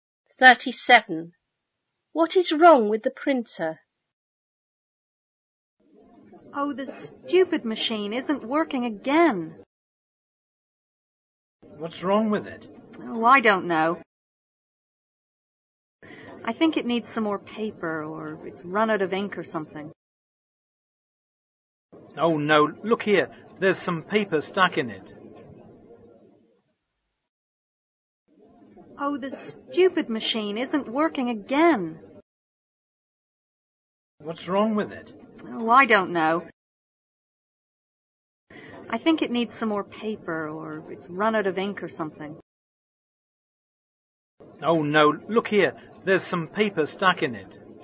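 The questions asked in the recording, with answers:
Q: What is wrong with the printer?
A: Some paper is stuck in it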